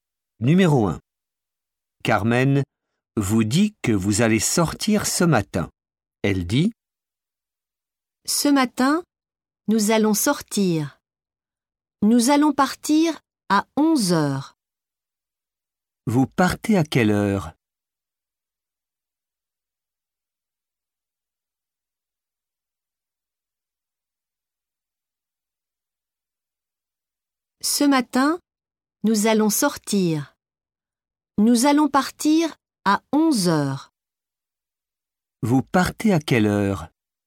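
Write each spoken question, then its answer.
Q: Vous partez à quelle heure?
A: À 11h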